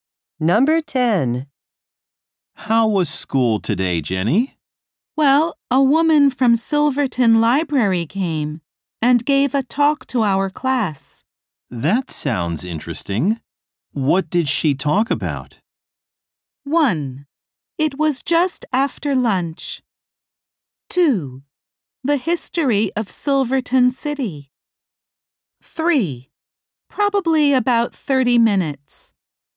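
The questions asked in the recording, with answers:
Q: That sounds interesting. What did she talk about?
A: 2: The history of Silverton City.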